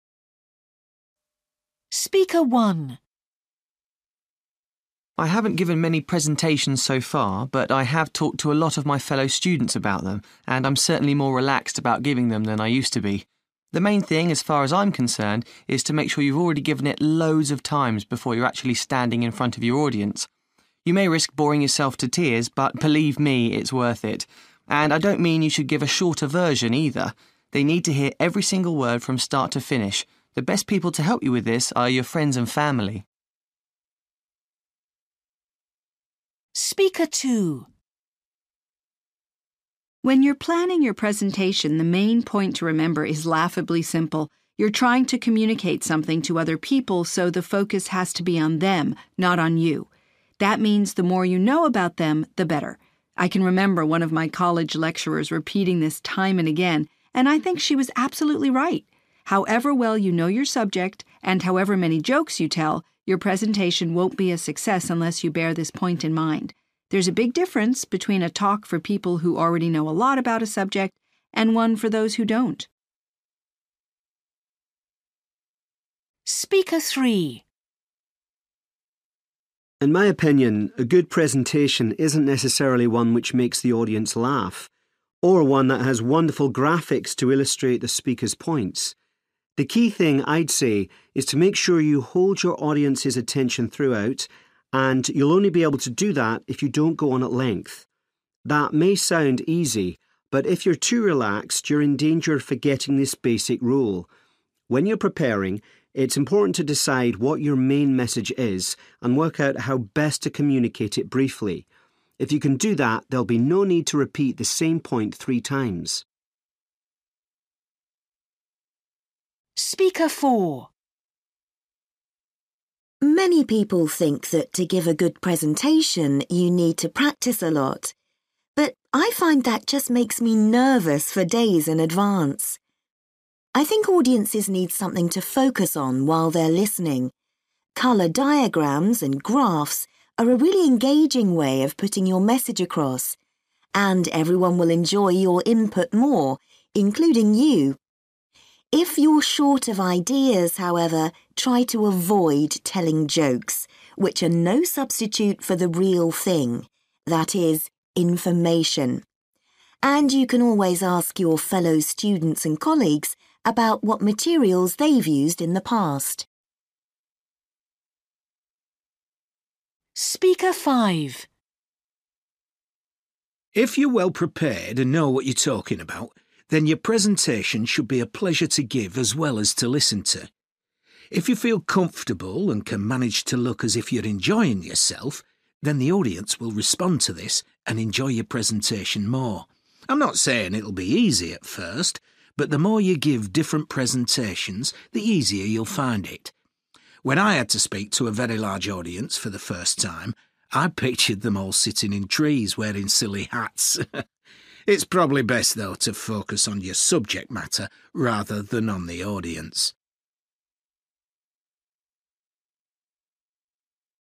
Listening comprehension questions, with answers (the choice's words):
For questions 19-23, choose from the list (A-H) what advice each person gives.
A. Keep your presentation short.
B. Remember to repeat your main point.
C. Support your presentation with visuals.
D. Add some humour.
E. Practise giving your presentation.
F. Try to relax during your presentation.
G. Don't try to memorise every word.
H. Find out about your audience.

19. Speaker 1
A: Practise giving your presentation.

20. Speaker 2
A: Find out about your audience.

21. Speaker 3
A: Keep your presentation short.

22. Speaker 4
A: Support your presentation with visuals.

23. Speaker 5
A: Try to relax during your presentation.

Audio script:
I haven't given many presentations so far, but I have talked to a lot of my fellow students about them and I'm certainly more relaxed about giving them than I used to be. The main thing as far as I'm concerned is to make sure you've already given it loads of times before you're actually standing in front of your audience. You may risk boring yourself to tears, but believe me, it's worth it! And I don't mean you should give a shorter version, either. They need to hear every single word, from start to finish. The best people to help you with this are your friends and family.
When you're planning your presentation, the main point to remember is laughably simple: you're trying to communicate something to other people, so the focus has to be on them, not on you. That means the more you know about them, the better. I can remember one of my college lecturers repeating this time and again, and I think she was absolutely right. However well you know your subject and however many jokes you tell, your presentation won't be a success unless you bear this point in mind. There's a big difference between a talk for people who already know a lot about a subject and one for those who don't.
In my opinion, a good presentation isn't necessarily one which makes the audience laugh, or one that has wonderful graphics to illustrate the speaker's points. The key thing, I'd say, is to make sure you hold your audience's attention throughout, and you'll only be able to do that if you don't go on at length. That may sound easy, but if you're too relaxed you're in danger of forgetting this basic rule. When you're preparing, it's important to decide what your main message is and work out how best to communicate it briefly. If you can do that there'll be no need to repeat the same point three times.
Many people think that to give a good presentation, you need to practise a lot, but I find that just makes me nervous for days in advance. I think audiences need something to focus on while they're listening. Colour diagrams and graphs are a really engaging way of putting your message across, and everyone will enjoy your input more, including you. If you're short of ideas however, try to avoid telling jokes, which are no substitute for the real thing, that is, information. And you can always ask your fellow students and colleagues about what materials they've used in the past!
If you're well prepared and know what you're talking about, then your presentation should be a pleasure to give as well as to listen to. If you feel comfortable and can manage to look as if you're enjoying yourself, then the audience will respond to this and enjoy your presentation more. I'm not saying it'll be easy at first, but the more you give different presentations, the easier you'll find it. When I had to speak to a very large audience for the first time, I pictured them all sitting in trees wearing silly hats. It's probably best, though, to focus on your subject matter rather than on the audience!

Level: B2